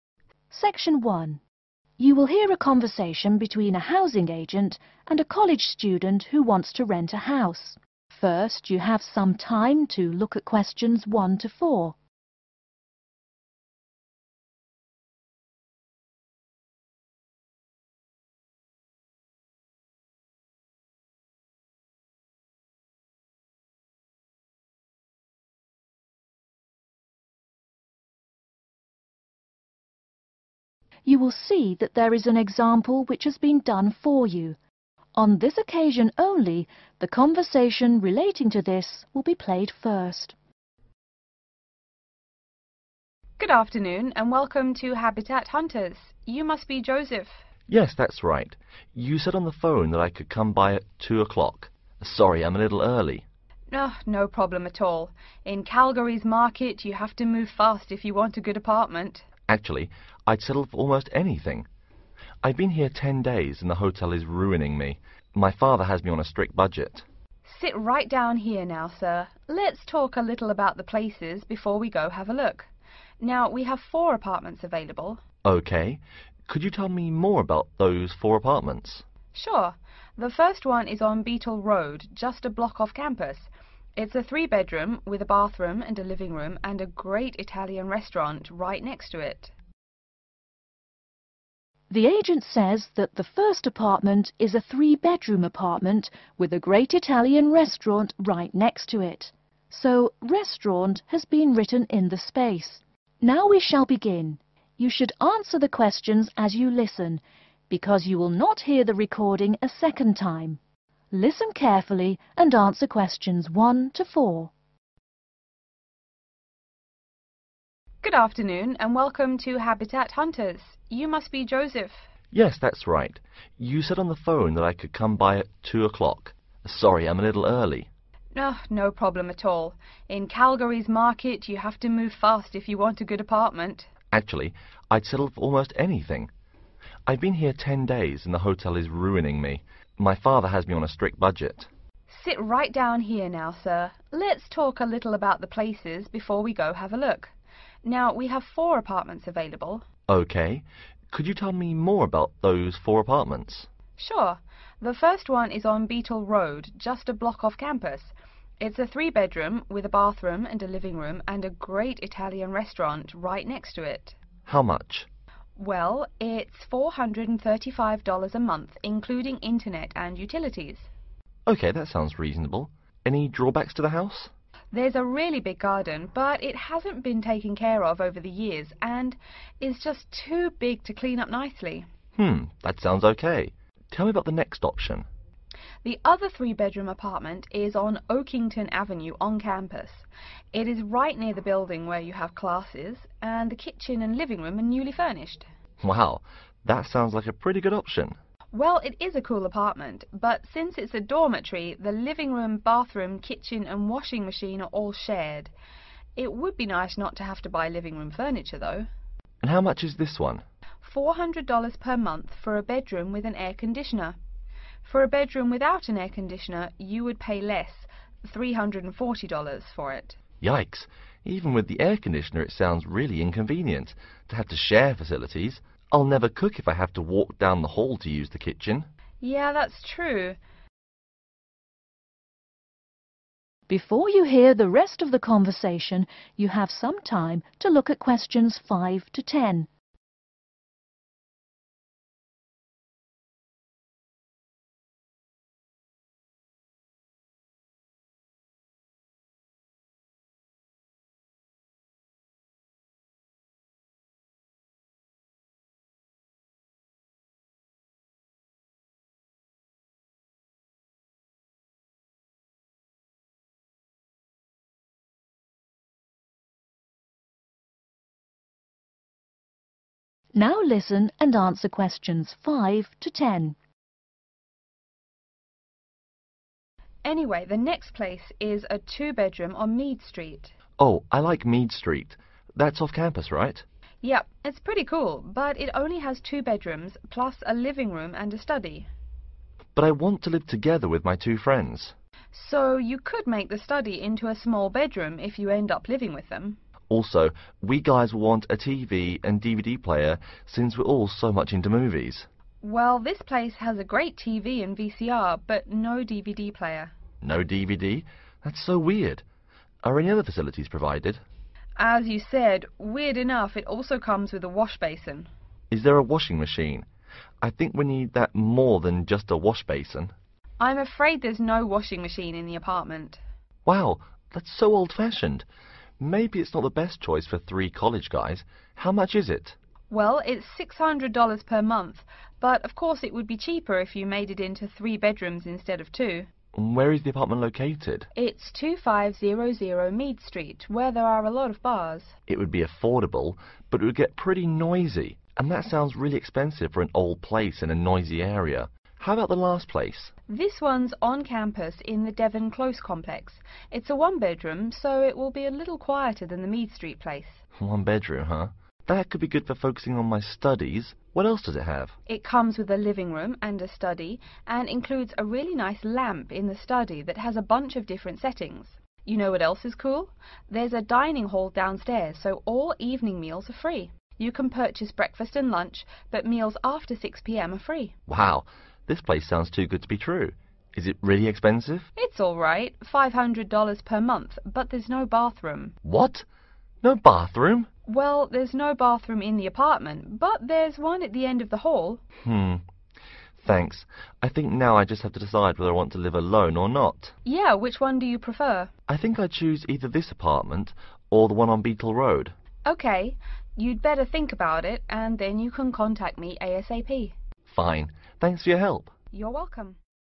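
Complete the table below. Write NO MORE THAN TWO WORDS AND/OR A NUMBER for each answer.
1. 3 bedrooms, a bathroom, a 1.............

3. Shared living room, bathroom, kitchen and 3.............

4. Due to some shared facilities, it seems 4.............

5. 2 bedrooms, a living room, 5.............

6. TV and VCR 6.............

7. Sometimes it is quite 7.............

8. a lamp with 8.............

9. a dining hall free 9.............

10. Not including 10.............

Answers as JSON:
{"1": "living room", "3": "washing machine", "4": "inconvenient", "5": "study", "6": "wash basin", "7": "noisy", "8": "different settings", "9": "evening meals", "10": "bathroom"}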